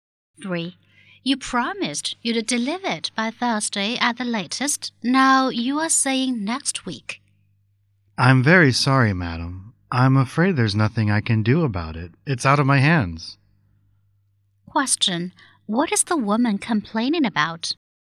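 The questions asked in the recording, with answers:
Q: What is the woman complaining about?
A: The delivery is late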